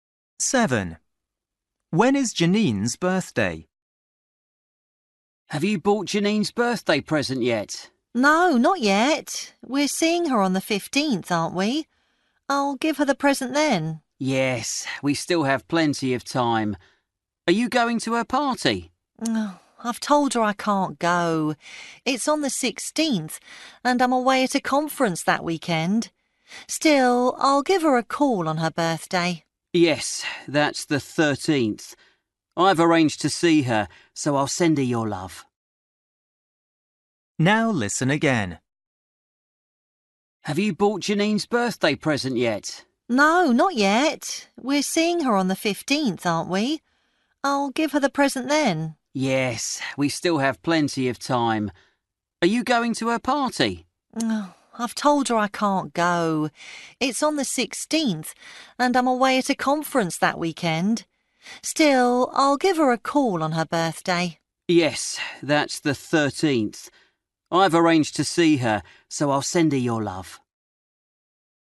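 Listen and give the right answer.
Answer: The 13th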